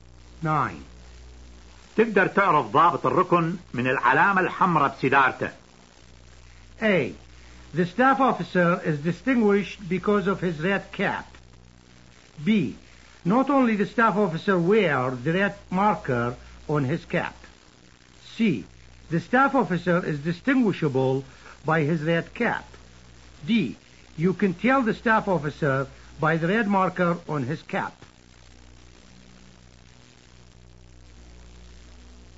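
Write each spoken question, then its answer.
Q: تقدر تعرف ضابط الركن من العلامة الحمراء بسيدارته.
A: D: You can tell the staff officer by the red marker on his cap.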